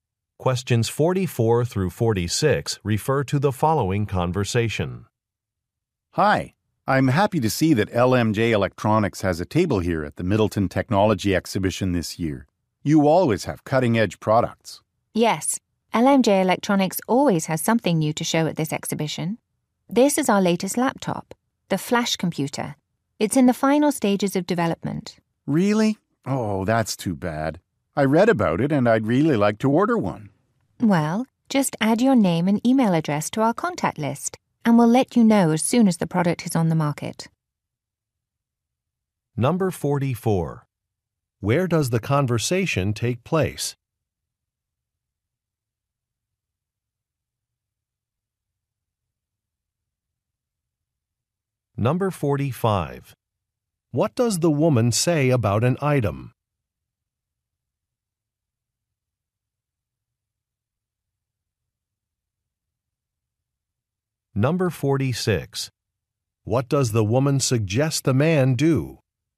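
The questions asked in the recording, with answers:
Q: Where does the conversation take place?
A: At a technology exhibition

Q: What does the woman say about an item?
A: It is still in development

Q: What does the woman suggest the man do?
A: Add his name and email to the contact list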